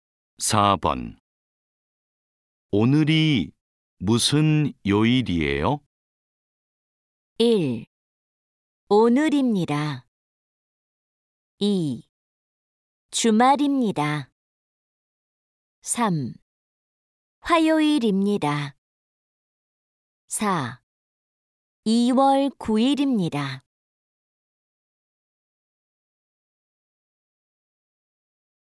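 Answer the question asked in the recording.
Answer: 3: 화요일입니다.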